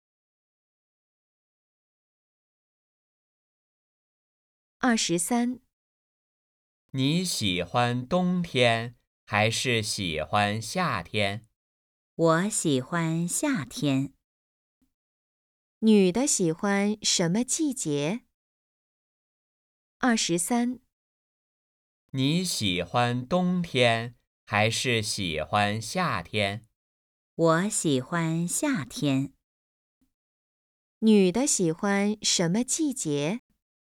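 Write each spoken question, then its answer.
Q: 女的喜欢什么季节?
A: 夏天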